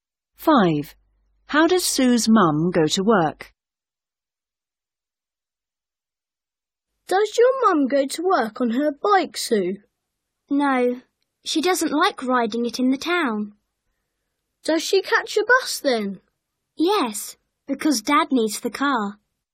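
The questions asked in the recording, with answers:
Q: How does Sue's mum go to work?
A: By bus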